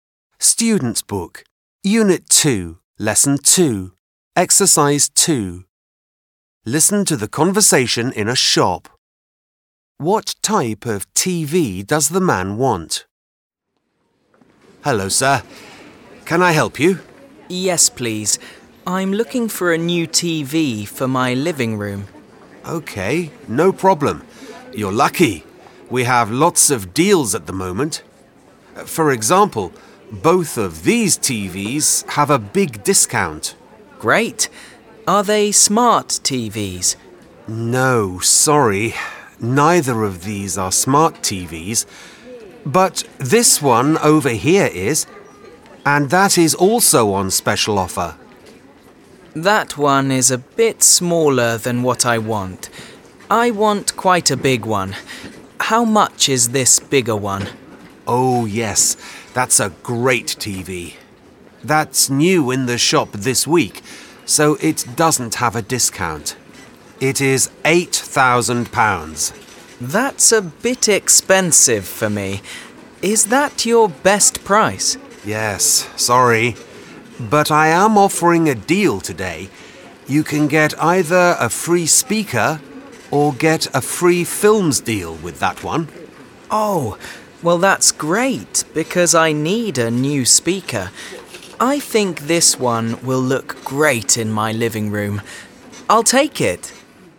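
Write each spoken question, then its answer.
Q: What type of TV does the man want?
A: A big smart TV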